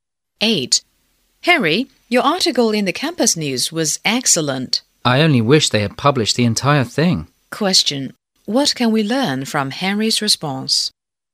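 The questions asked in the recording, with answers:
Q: What can we learn from Henry's response?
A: Only part of his article was published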